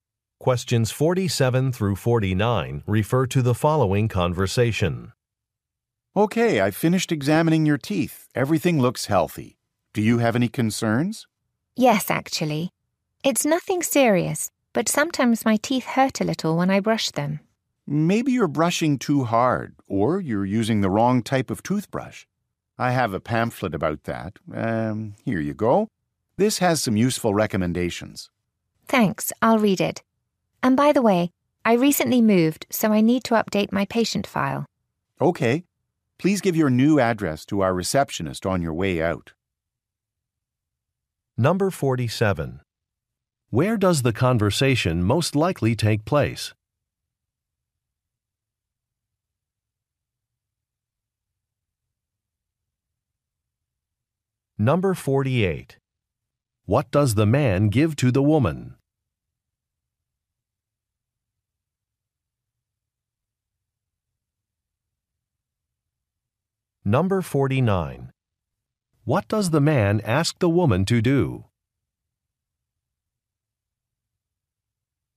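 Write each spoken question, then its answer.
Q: Where does the conversation most likely take place?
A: At a dentist's office

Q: What does the man give to the woman?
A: A pamphlet

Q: What does the man ask the woman to do?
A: Give her new address to the receptionist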